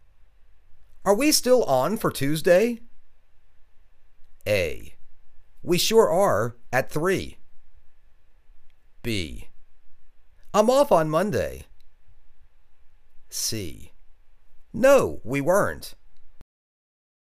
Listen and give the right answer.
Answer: We sure are. At three.